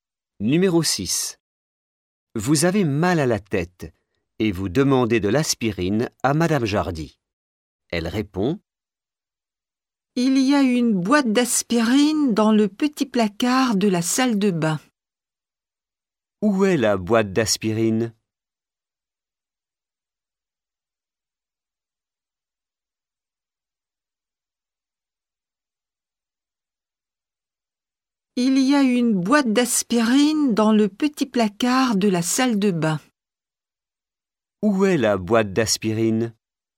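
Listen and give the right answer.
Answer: Dans le petit placard de la salle de bain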